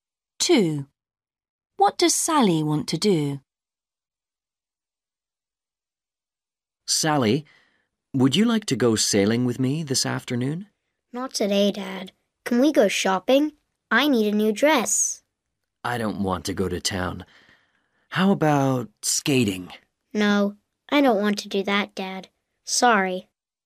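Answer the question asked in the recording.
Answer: go shopping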